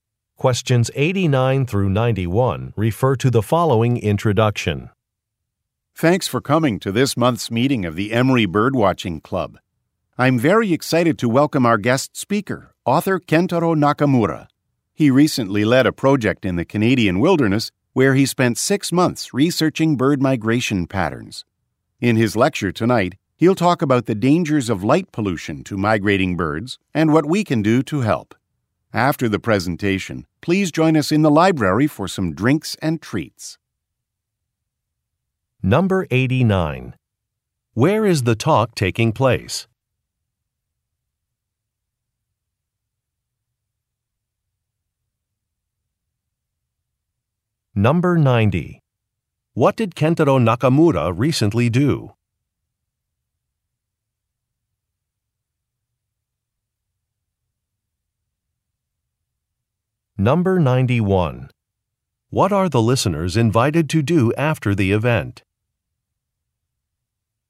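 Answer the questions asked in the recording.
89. At a birdwatching club meeting
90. He led a research project on bird migration in the Canadian wilderness
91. Have drinks and treats in the library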